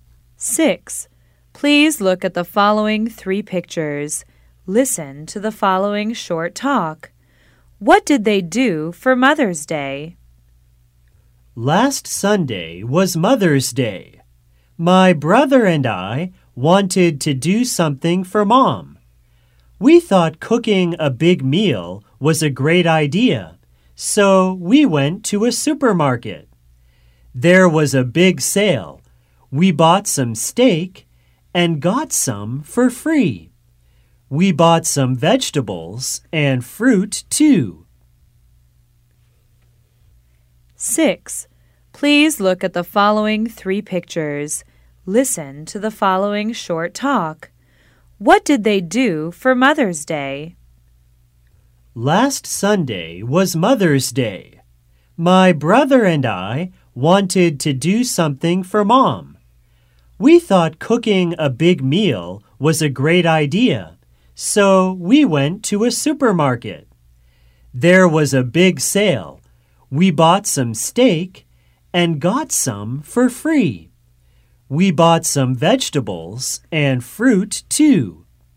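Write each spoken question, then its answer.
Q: What did they do for Mother's Day?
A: They cooked a big meal for Mom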